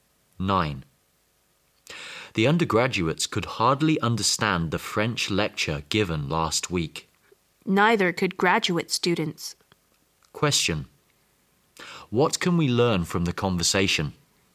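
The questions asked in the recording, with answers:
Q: What can we learn from the conversation?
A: Neither undergraduates nor graduate students could understand the French lecture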